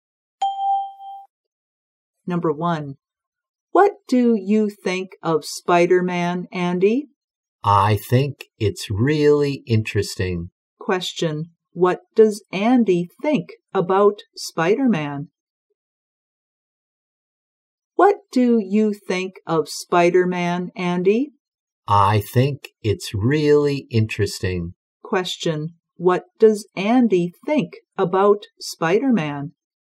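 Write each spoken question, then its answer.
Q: what does Andy think about Spider-Man?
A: It's really interesting.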